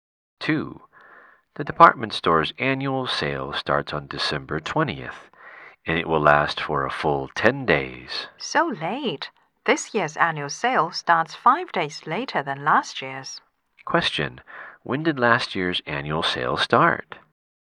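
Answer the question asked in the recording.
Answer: December 15th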